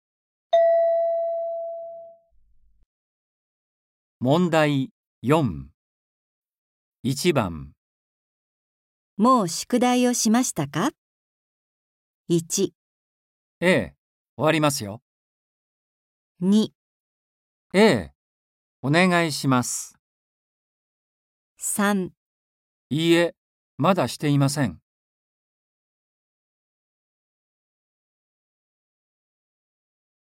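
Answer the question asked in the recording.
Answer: 3

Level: N4.36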